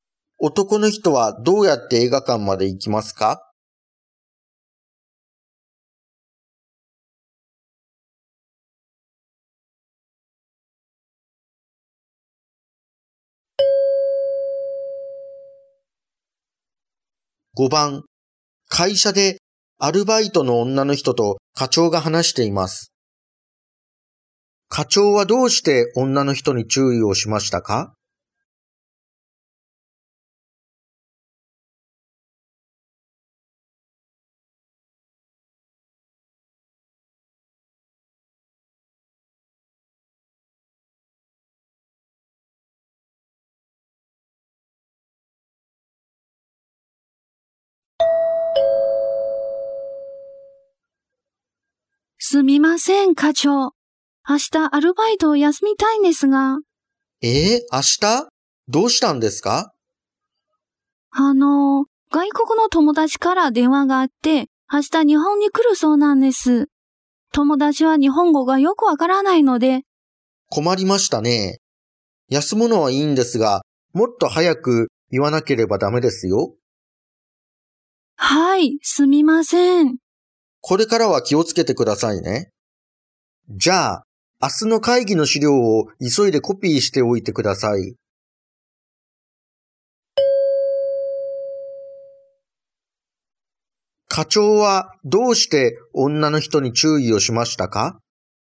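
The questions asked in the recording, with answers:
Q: 課長はどうして女の人に注意をしましたか?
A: 休むことをもっと早く言わなかったから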